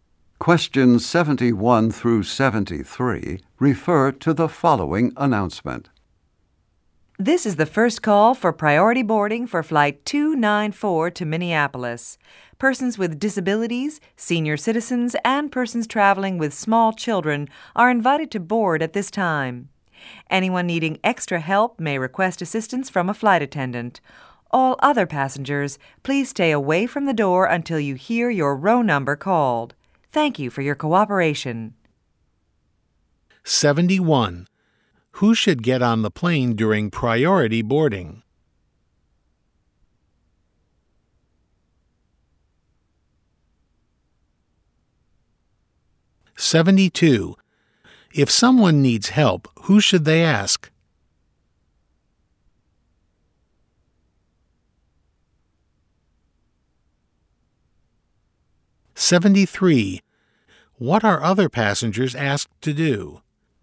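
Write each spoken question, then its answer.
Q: Who should get on the plane during priority boarding?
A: Persons with disabilities, senior citizens, and people traveling with small children

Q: If someone needs help, who should they ask?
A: A flight attendant

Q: What are other passengers asked to do?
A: Stay away from the door until their row number is called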